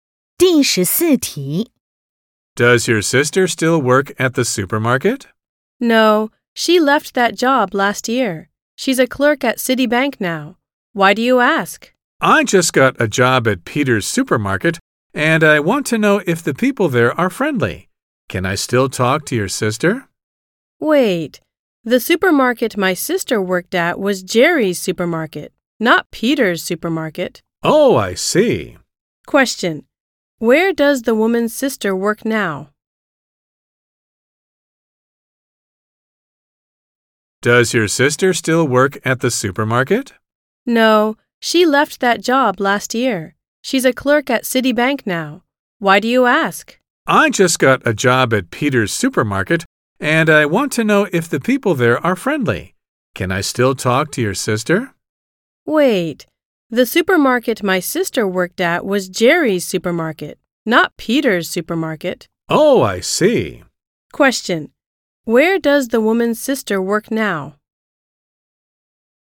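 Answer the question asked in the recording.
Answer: At Citibank, as a clerk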